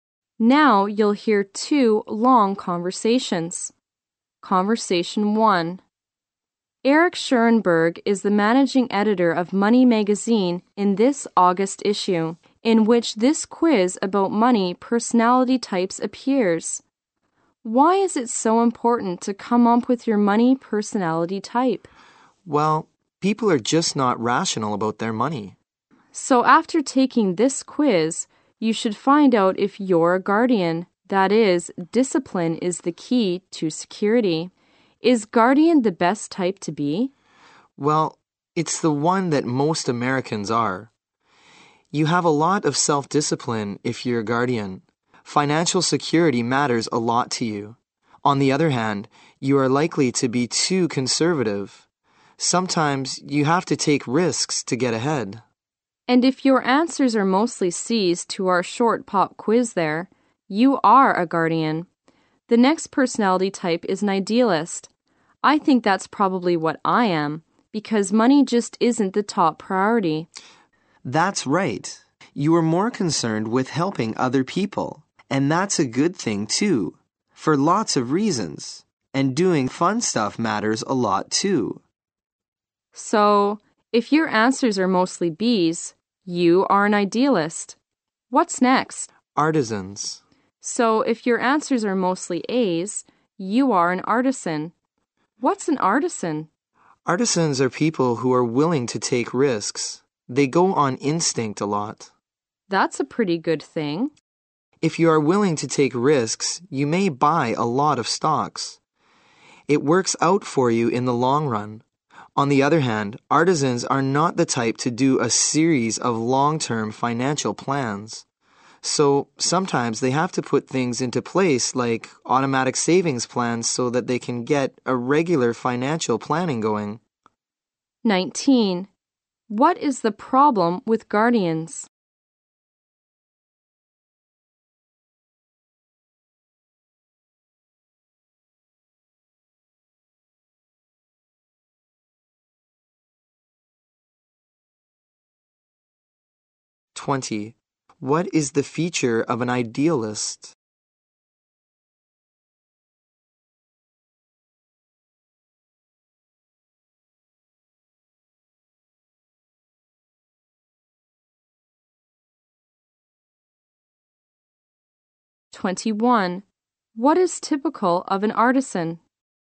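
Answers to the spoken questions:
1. They are likely to be too conservative
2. They care more about helping others than about money
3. They are willing to take risks and go on instinct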